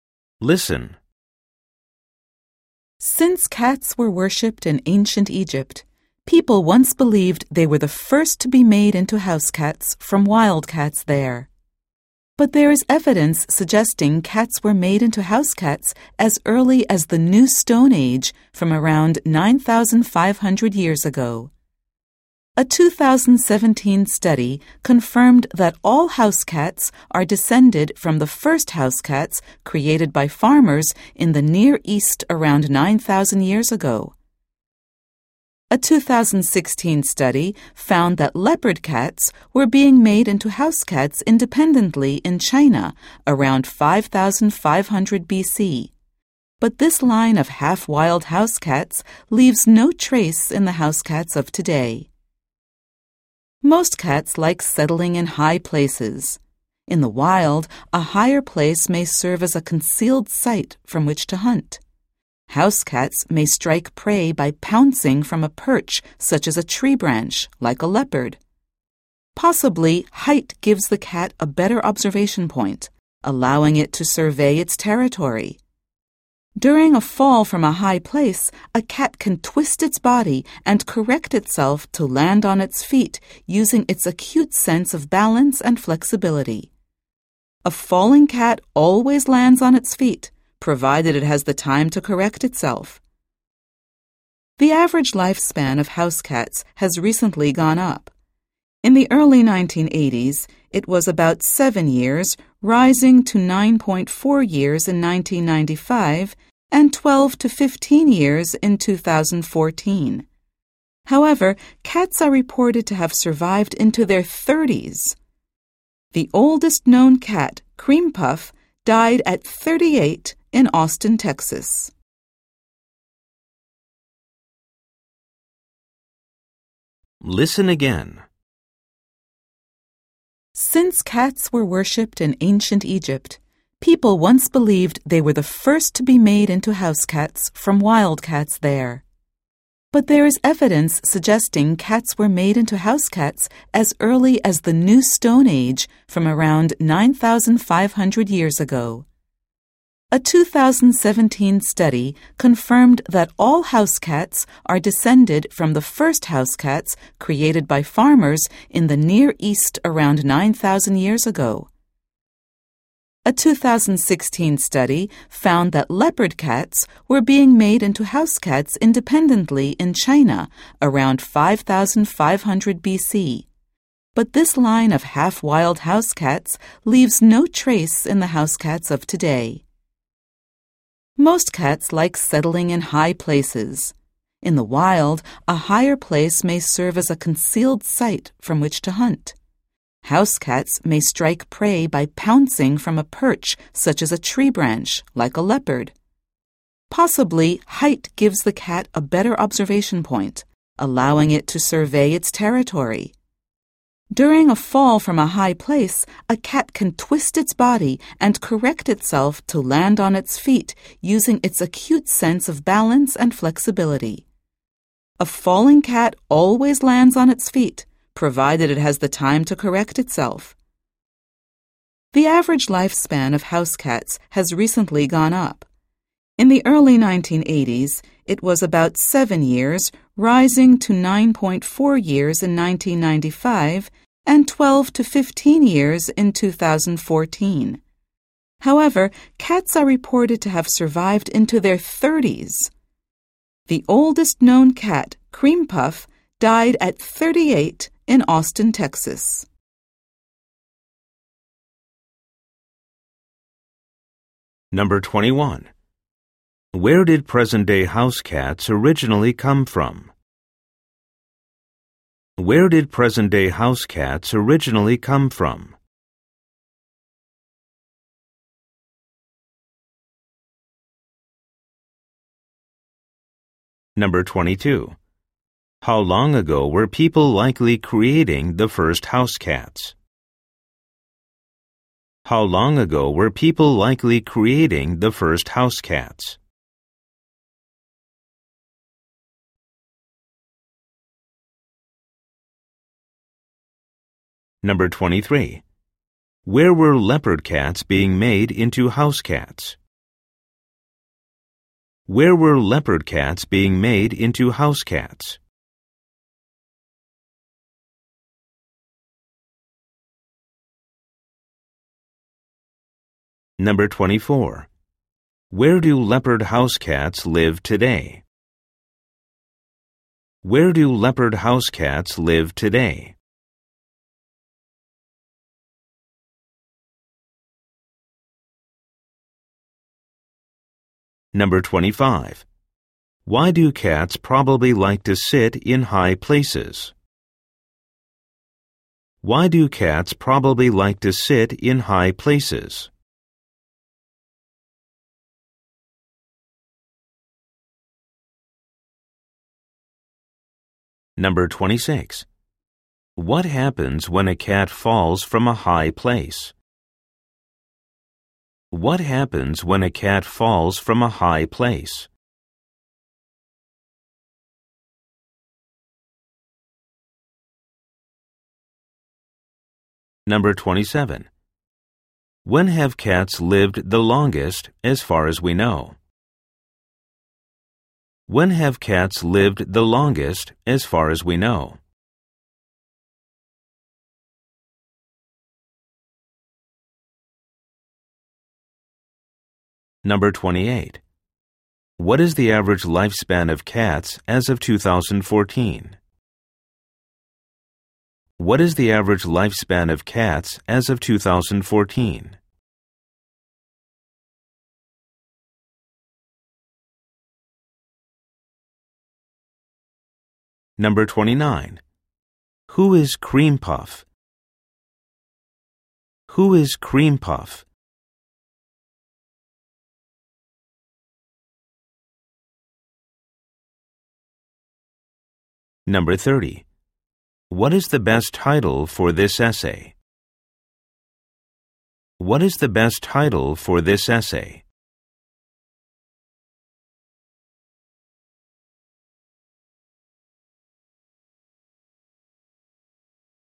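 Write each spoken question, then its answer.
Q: Where did present-day house cats originally come from?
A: The Near East

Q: Where were leopard cats being made into house cats?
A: In China

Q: Why do cats probably like to sit in high places?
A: To hunt from a hidden spot and observe their territory

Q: What happens when a cat falls from a high place?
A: It twists its body and lands on its feet

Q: What is the average lifespan of cats as of 2014?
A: 12 to 15 years

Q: Who is Cream Puff?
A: The oldest known cat, which died at 38 in Austin, Texas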